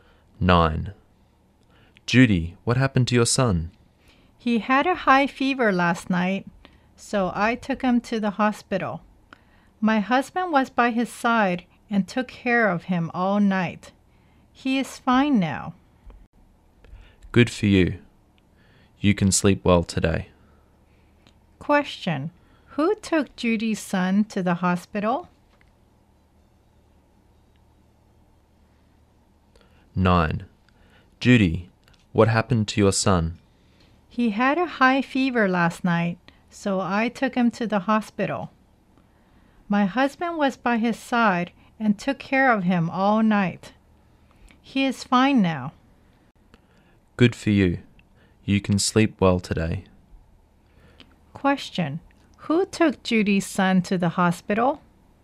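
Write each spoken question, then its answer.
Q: Question. Who took Judy's son to the hospital?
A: Judy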